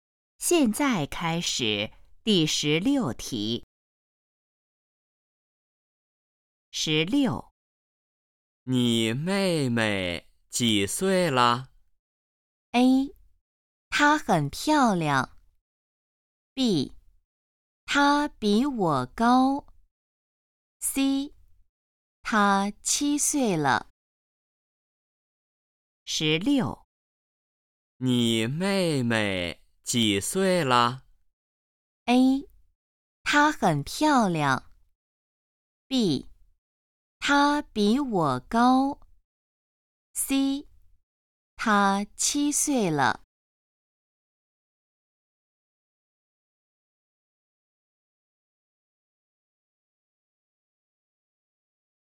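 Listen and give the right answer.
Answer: C: 她七岁了。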